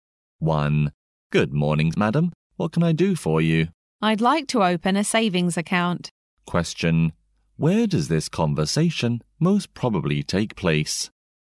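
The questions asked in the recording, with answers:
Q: Where does this conversation most probably take place?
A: In a bank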